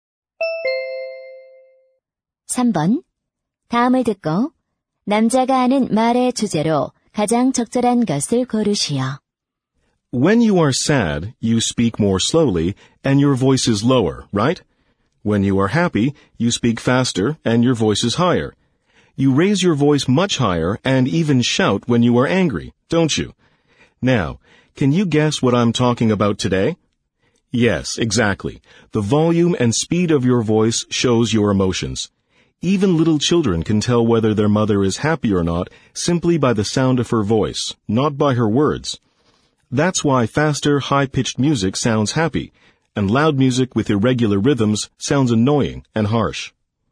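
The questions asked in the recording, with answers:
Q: 다음을 듣고 남자가 하는 말의 주제로 가장 적절한 것을 고르시오.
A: 목소리의 크기와 속도가 감정을 드러낸다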